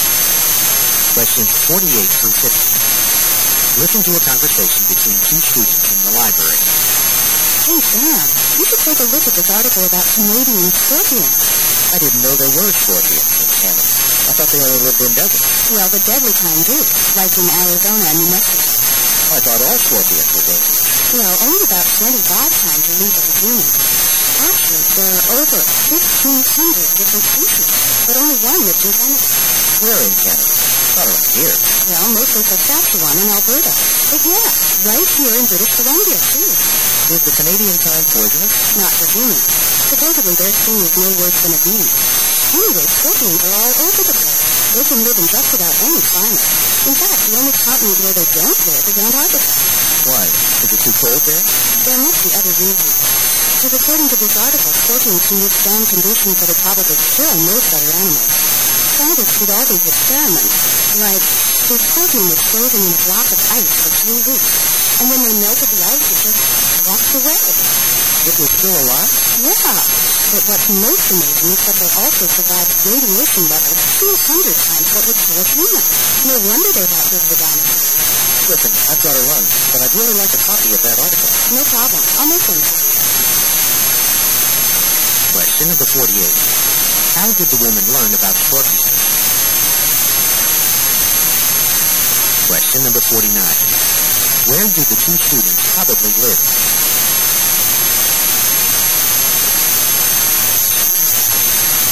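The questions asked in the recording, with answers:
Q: How did the woman learn about scorpions?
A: By reading an article

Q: Where do the two students probably live?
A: In British Columbia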